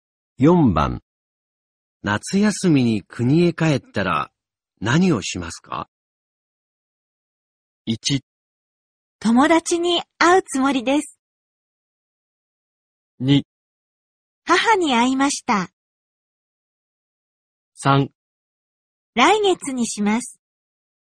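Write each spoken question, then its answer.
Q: 夏休みに国へ帰ったら、何をしますか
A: 1: 友達に会うつもりです。

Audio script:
1
友達に会うつもりです。
2
母に会いました。
3
来月にします。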